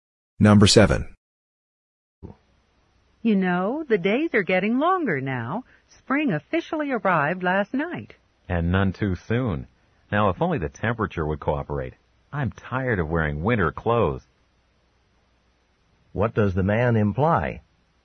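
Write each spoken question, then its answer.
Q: What does the man imply?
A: He wishes it were warmer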